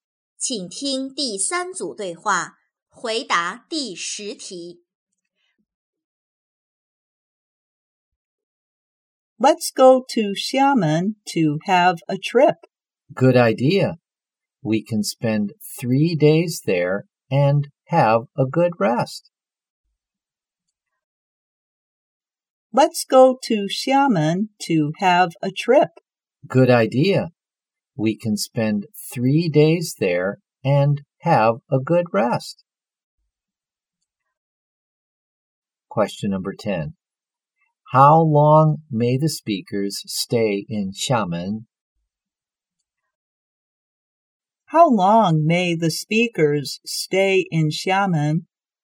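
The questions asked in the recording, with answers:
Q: How long may the speakers stay in Xiamen?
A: 3 days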